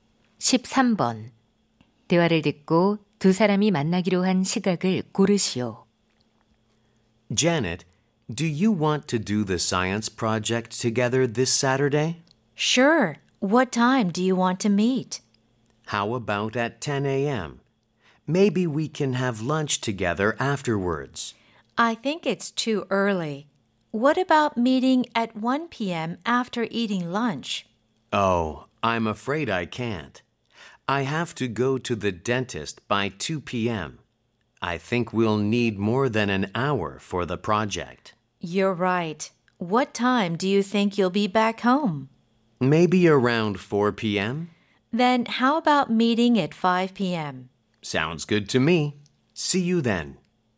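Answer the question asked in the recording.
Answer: 오후 5시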